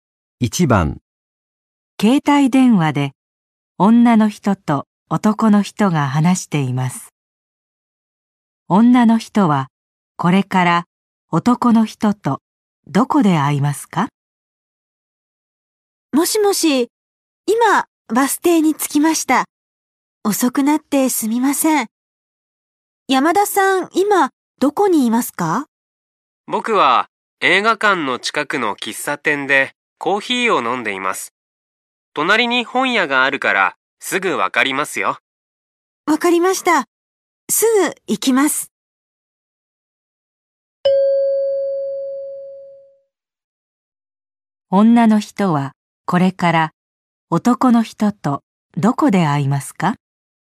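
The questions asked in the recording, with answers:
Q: 女の人はこれから男の人とどこで会いますか?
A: 映画館の近くの喫茶店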